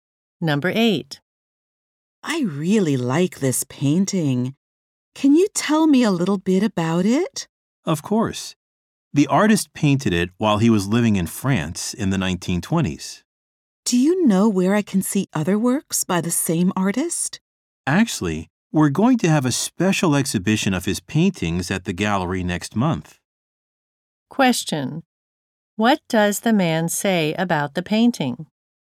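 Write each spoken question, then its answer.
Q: What does the man say about the painting?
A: The artist painted it while living in France in the 1920s.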